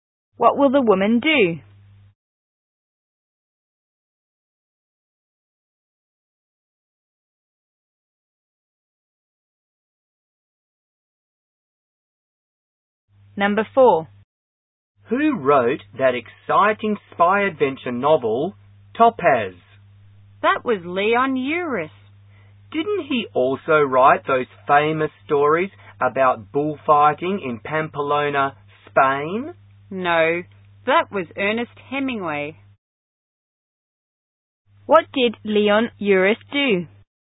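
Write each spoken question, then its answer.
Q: What did Leon Uris do?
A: He wrote the spy novel Topaz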